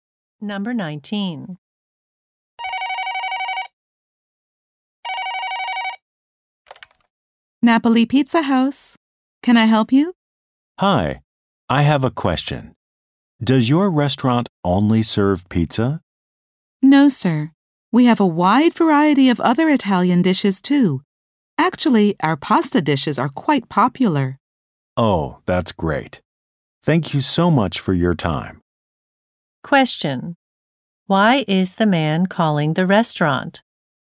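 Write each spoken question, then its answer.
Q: Why is the man calling the restaurant?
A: To ask if they serve food other than pizza.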